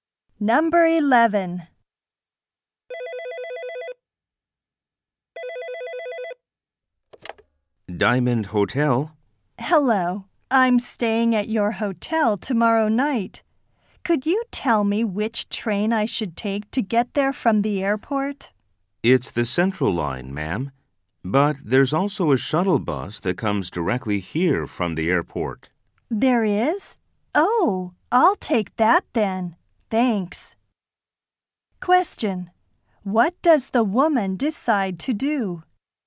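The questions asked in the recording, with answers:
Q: What does the woman decide to do?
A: Take the shuttle bus from the airport.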